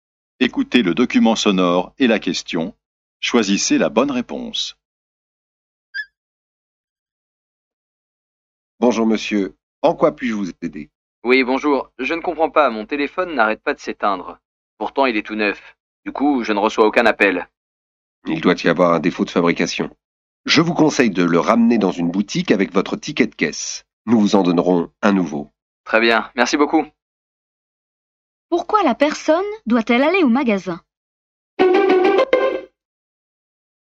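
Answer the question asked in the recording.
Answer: Pour échanger son téléphone neuf défectueux contre un nouveau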